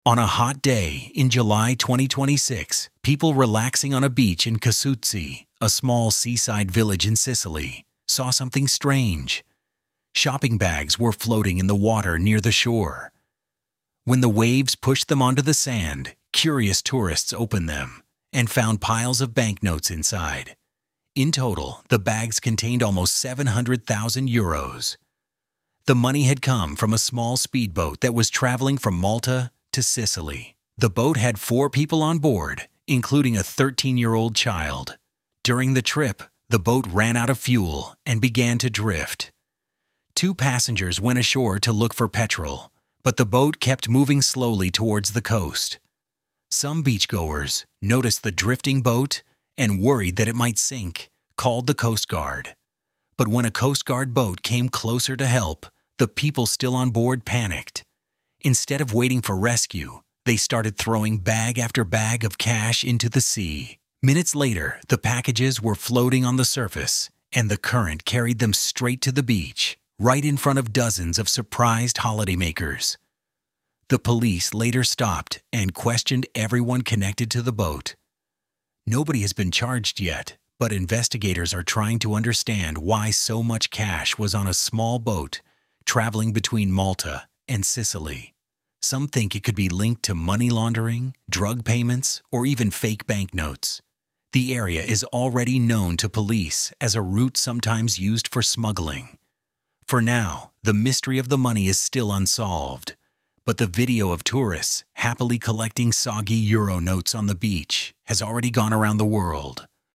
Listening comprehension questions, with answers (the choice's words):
Choose the correct answer (a, b, c or d) for each question.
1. Where did the bags of money first appear?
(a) In a shop in Malta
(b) Floating in the sea near a beach in Sicily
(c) In a police station in Ragusa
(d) On a train to Palermo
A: Floating in the sea near a beach in Sicily

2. Why did the speedboat start drifting towards the shore?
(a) The driver fell asleep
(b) It was hit by another boat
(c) It ran out of fuel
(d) A storm pushed it off course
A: It ran out of fuel

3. What made the people on the boat throw the money into the sea?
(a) They wanted to hide the cash before the coast guard reached them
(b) The bags were too heavy for the boat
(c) They thought the money was fake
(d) A passenger accidentally dropped the bags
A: They wanted to hide the cash before the coast guard reached them

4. Roughly how much money was found in total?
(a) About €7,000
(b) About €70,000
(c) About €700,000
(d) About €7,000,000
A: About €700,000

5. What is the current situation with the investigation?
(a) The case is completely closed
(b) Everyone involved has already been found guilty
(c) Nobody has been charged, and police are still investigating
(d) The money was returned to its owner immediately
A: Nobody has been charged, and police are still investigating

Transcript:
On a hot day in July 2026, people relaxing on a beach in Casuzze, a small seaside village in Sicily, saw something strange. Shopping bags were floating in the water near the shore. When the waves pushed them onto the sand, curious tourists opened them, and found piles of banknotes inside. In total, the bags contained almost €700,000.
The money had come from a small speedboat that was travelling from Malta to Sicily. The boat had four people on board, including a 13-year-old child. During the trip, the boat ran out of fuel and began to drift. Two passengers went ashore to look for petrol, but the boat kept moving slowly towards the coast.
Some beachgoers noticed the drifting boat and, worried that it might sink, called the coast guard. But when a coast guard boat came closer to help, the people still on board panicked. Instead of waiting for rescue, they started throwing bag after bag of cash into the sea. Minutes later, the packages were floating on the surface, and the current carried them straight to the beach, right in front of dozens of surprised holidaymakers.
The police later stopped and questioned everyone connected to the boat. Nobody has been charged yet, but investigators are trying to understand why so much cash was on a small boat travelling between Malta and Sicily. Some think it could be linked to money laundering, drug payments, or even fake banknotes. The area is already known to police as a route sometimes used for smuggling. For now, the mystery of the money is still unsolved, but the video of tourists happily collecting soggy euro notes on the beach has already gone around the world.